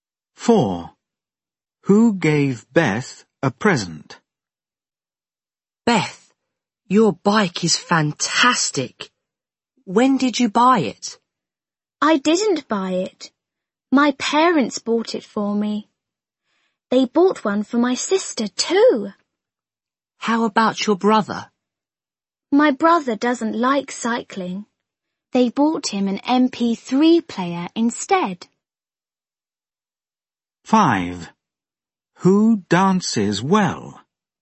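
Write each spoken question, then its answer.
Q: Who gave Beth a present?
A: Her parents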